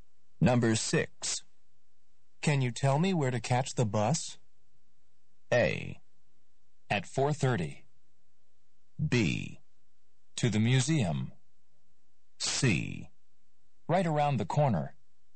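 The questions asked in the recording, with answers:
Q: Can you tell me where to catch the bus?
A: C: Right around the corner.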